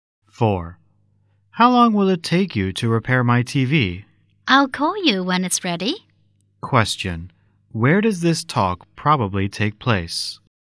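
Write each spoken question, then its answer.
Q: Where does this talk probably take place?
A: At a TV repair shop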